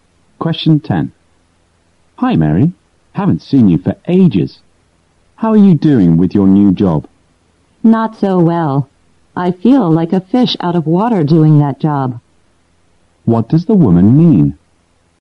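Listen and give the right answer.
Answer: She feels uncomfortable and out of place in her new job.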